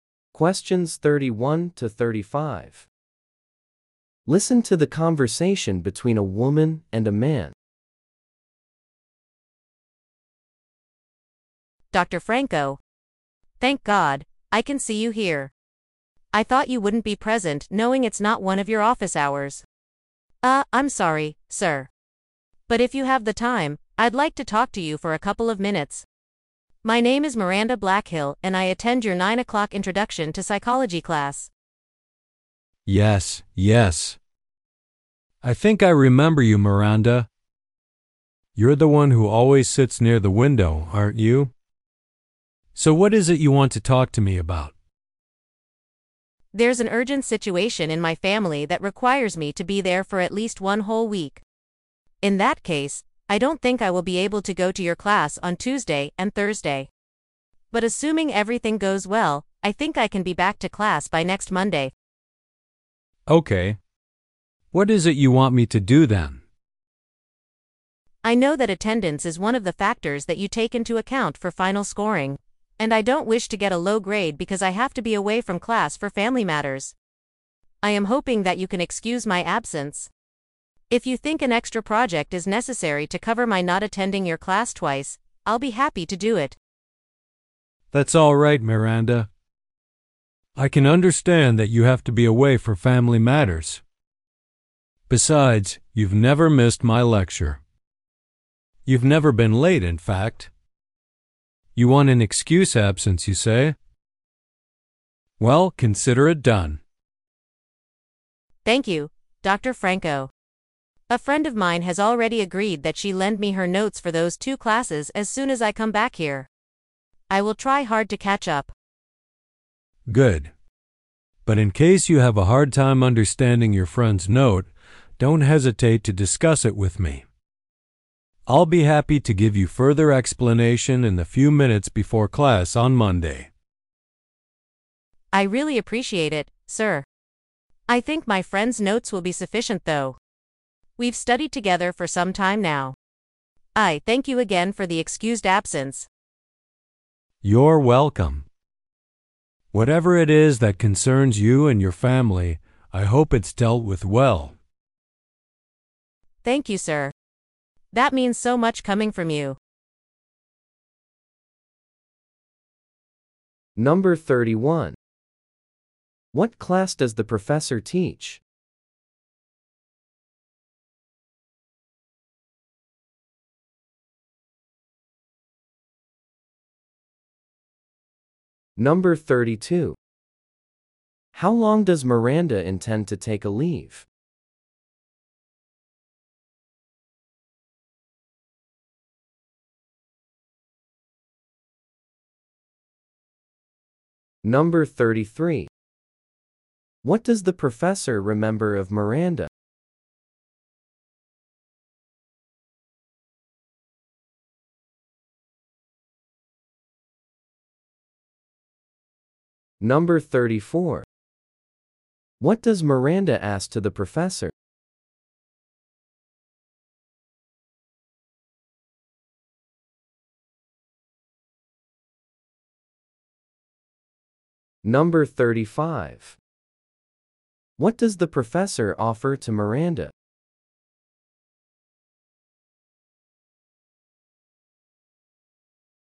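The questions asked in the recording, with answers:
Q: What class does the professor teach?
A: Introduction to psychology.

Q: How long does Miranda intend to take a leave?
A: About one week.

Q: What does the professor remember of Miranda?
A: She always sits near the window.

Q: What does Miranda ask to the professor?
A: To excuse her absence.

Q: What does the professor offer to Miranda?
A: To explain the material she missed before class on Monday.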